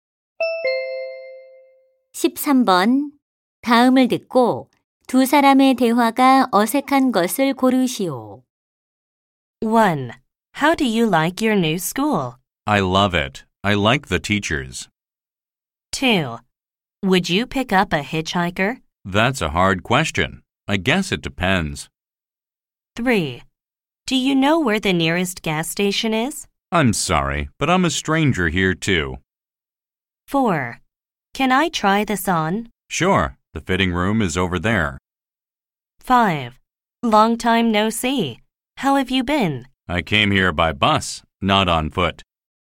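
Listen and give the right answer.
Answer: 5: Long time no see. How have you been? / I came here by bus, not on foot.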